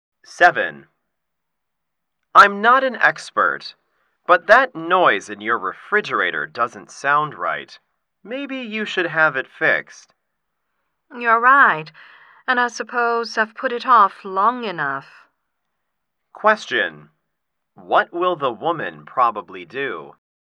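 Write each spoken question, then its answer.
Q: What will the woman probably do?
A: Have the refrigerator fixed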